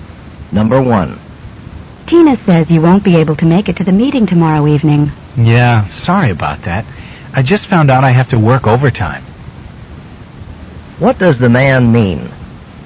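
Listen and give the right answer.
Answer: He can't come to the meeting because he has to work overtime.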